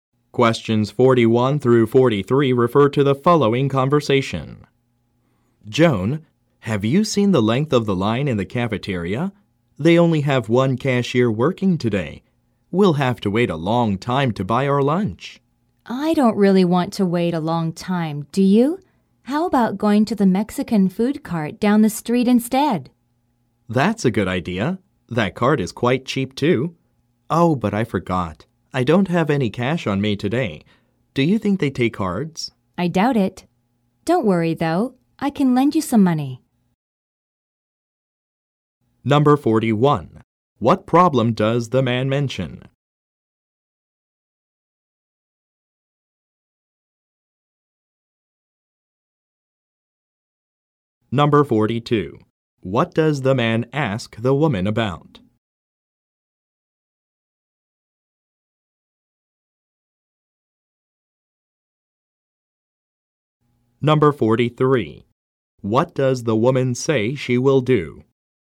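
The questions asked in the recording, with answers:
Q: What problem does the man mention?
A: There is a long line in the cafeteria (only one cashier)

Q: What does the woman say she will do?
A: Lend him some money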